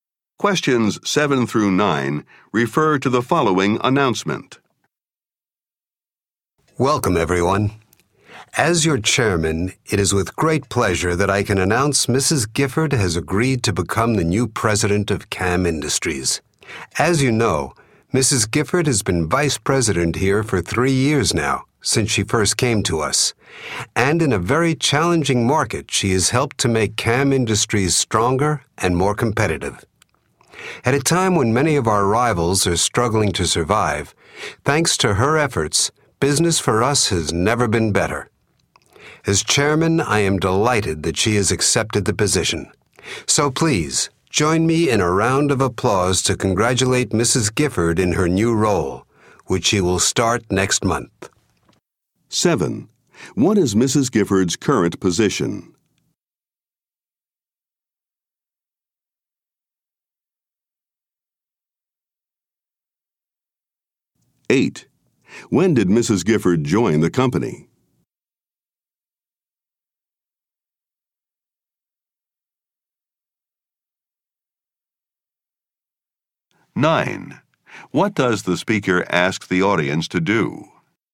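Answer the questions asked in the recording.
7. Vice president
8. Three years ago
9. Applaud to congratulate Mrs. Gifford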